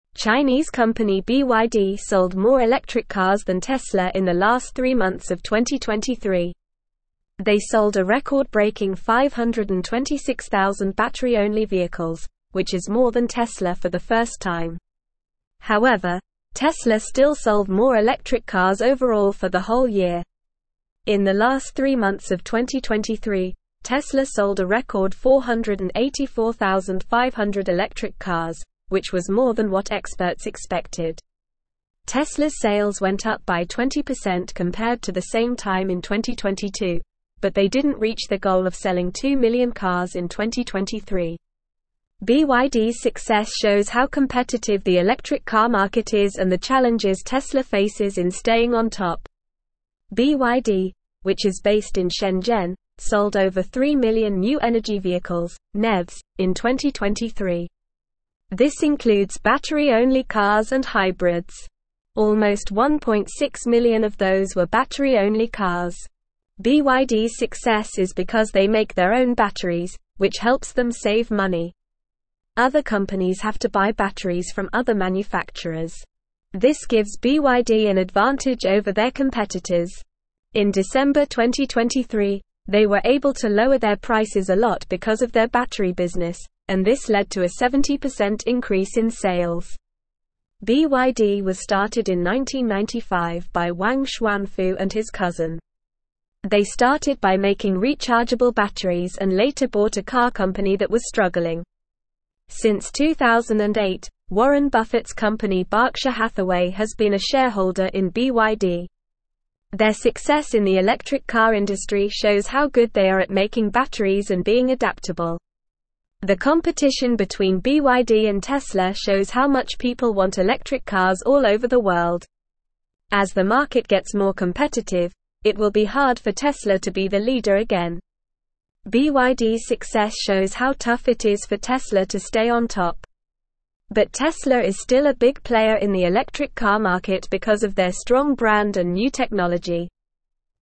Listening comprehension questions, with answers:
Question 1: Chinese company BYD sold more (1)______ cars than (2)______ in the last three months of 2023.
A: electric

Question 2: Chinese company BYD sold more (1)______ cars than (2)______ in the last three months of 2023.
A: Tesla

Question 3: They sold a record-breaking 526,000 battery-only vehicles, which is more than Tesla for the (3)______ time.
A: first

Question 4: In the last three months of 2023, Tesla sold a record 484,500 electric cars, which was more than what (4)______ expected.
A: experts

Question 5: Tesla's sales went up by 20% compared to the same time in 2022, but they didn't reach their goal of (5)______ two million cars in 2023.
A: selling

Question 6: BYD's success shows how (6)______ the electric car market is and the challenges Tesla (7)______ in staying on top.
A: competitive

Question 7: BYD's success shows how (6)______ the electric car market is and the challenges Tesla (7)______ in staying on top.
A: faces

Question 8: Other (8)______ have to buy batteries from other manufacturers.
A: companies

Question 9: This gives BYD an (9)______ over their competitors.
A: advantage

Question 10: BYD was (10)______ in 1995 by Wang Chuanfu and his cousin.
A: started

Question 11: They started by making rechargeable batteries and later bought a car (11)______ that was struggling.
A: company

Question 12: Since 2008, Warren Buffett's company Berkshire Hathaway has been a (12)______ in BYD.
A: shareholder

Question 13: Their (13)______ in the electric car industry shows how good they are at (14)______ batteries and being adaptable.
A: success

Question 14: Their (13)______ in the electric car industry shows how good they are at (14)______ batteries and being adaptable.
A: making

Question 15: The (15)______ between BYD and Tesla shows how much people want electric cars all over the world.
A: competition

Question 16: But Tesla is still a big player in the electric car market because of their (16)______ brand and new technology.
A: strong

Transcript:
Chinese company BYD sold more electric cars than Tesla in the last three months of 2023. They sold a record-breaking 526,000 battery-only vehicles, which is more than Tesla for the first time. However, Tesla still sold more electric cars overall for the whole year. In the last three months of 2023, Tesla sold a record 484,500 electric cars, which was more than what experts expected. Tesla's sales went up by 20% compared to the same time in 2022, but they didn't reach their goal of selling two million cars in 2023. BYD's success shows how competitive the electric car market is and the challenges Tesla faces in staying on top.
BYD, which is based in Shenzhen, sold over 3 million new energy vehicles (NEVs) in 2023. This includes battery-only cars and hybrids. Almost 1.6 million of those were battery-only cars. BYD's success is because they make their own batteries, which helps them save money. Other companies have to buy batteries from other manufacturers. This gives BYD an advantage over their competitors. In December 2023, they were able to lower their prices a lot because of their battery business, and this led to a 70% increase in sales.
BYD was started in 1995 by Wang Chuanfu and his cousin. They started by making rechargeable batteries and later bought a car company that was struggling. Since 2008, Warren Buffett's company Berkshire Hathaway has been a shareholder in BYD. Their success in the electric car industry shows how good they are at making batteries and being adaptable.
The competition between BYD and Tesla shows how much people want electric cars all over the world. As the market gets more competitive, it will be hard for Tesla to be the leader again. BYD's success shows how tough it is for Tesla to stay on top. But Tesla is still a big player in the electric car market because of their strong brand and new technology.

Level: Level 3